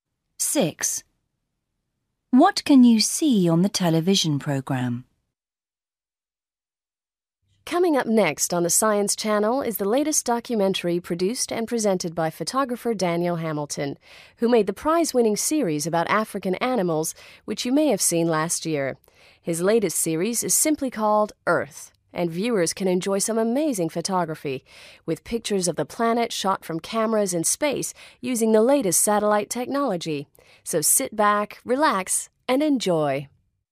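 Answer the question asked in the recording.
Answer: pictures of the Earth taken from space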